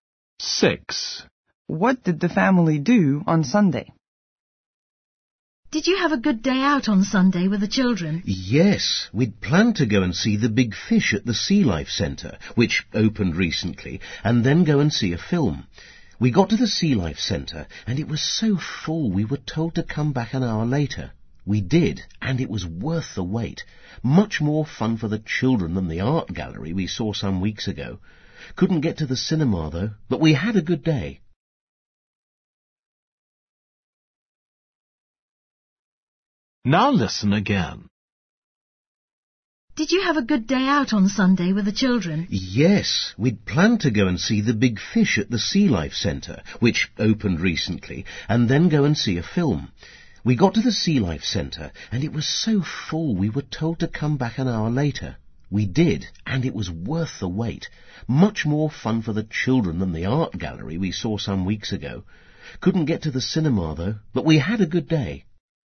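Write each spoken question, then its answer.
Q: What did the family do on Sunday?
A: they went to the Sea Life Centre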